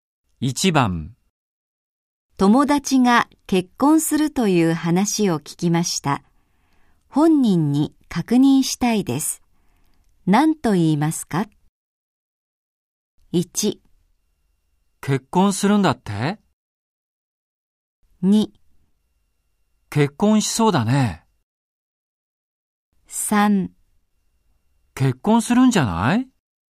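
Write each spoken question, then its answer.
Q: 友達が結婚するという話を聞きました。本人に確認したいです。何と言いますか?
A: 1: 結婚するんだって?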